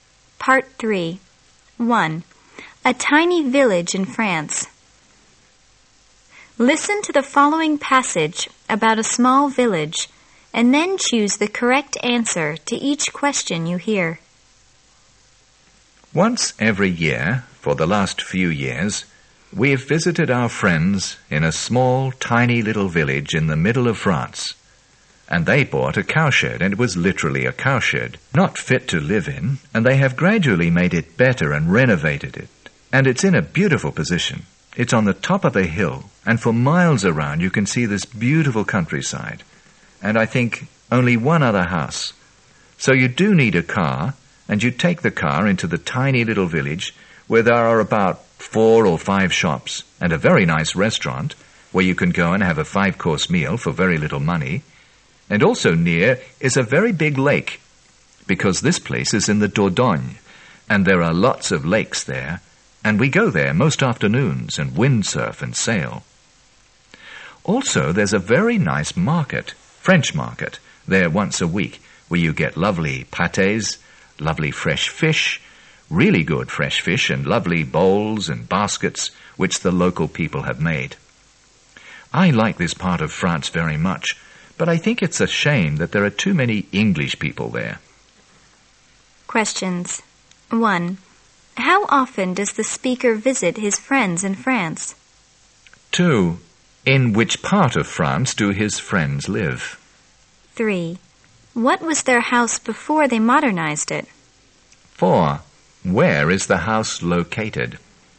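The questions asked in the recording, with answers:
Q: How often does the speaker visit his friends in France?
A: Once a year

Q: In which part of France do his friends live?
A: In the Dordogne

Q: What was their house before they modernized it?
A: A cowshed

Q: Where is the house located?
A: On top of a hill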